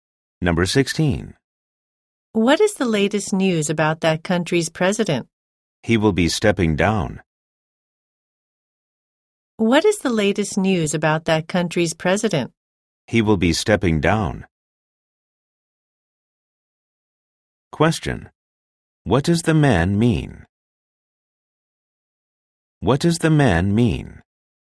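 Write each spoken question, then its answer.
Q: What does the man mean?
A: The president will resign.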